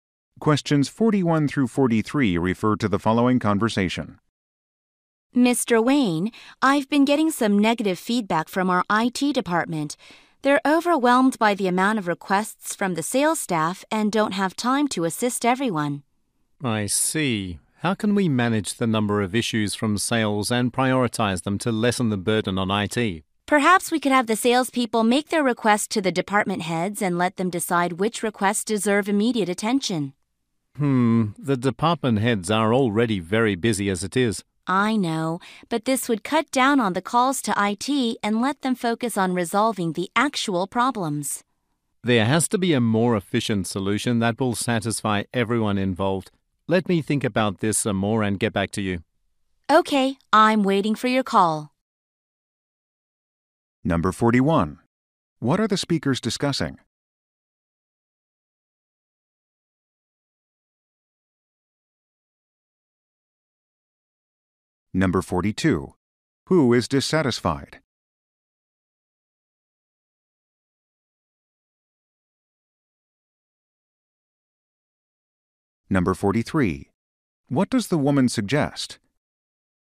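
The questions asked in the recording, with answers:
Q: What are the speakers discussing?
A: Too many sales staff requests overwhelming IT

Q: Who is dissatisfied?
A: The IT department

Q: What does the woman suggest?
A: Having salespeople send requests to department heads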